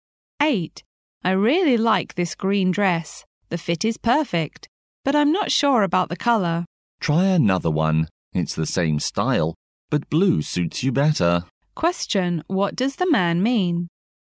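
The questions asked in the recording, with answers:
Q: what does the man mean?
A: She should try the same style in blue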